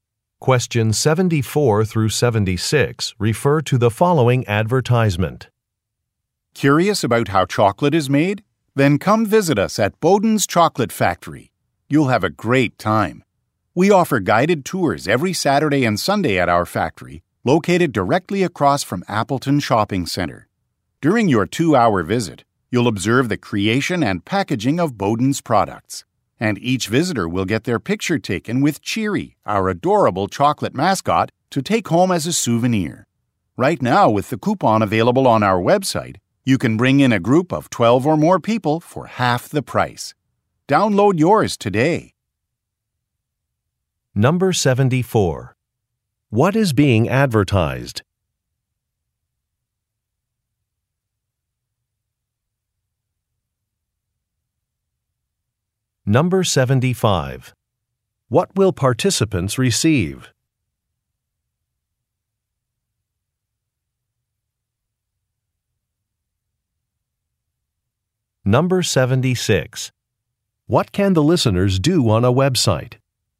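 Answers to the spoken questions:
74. A chocolate factory tour
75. A photo with the mascot
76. Download a coupon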